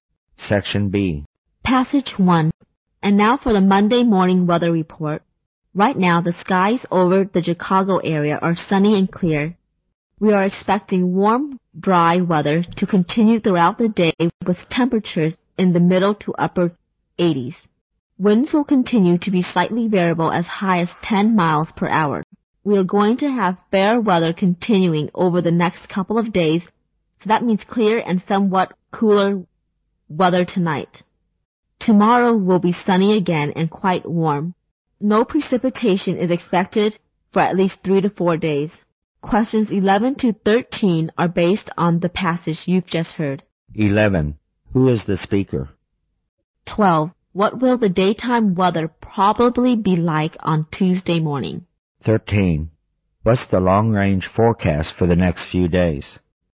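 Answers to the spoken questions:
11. A weather reporter
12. Sunny and quite warm
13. Fair and dry, no precipitation for 3 to 4 days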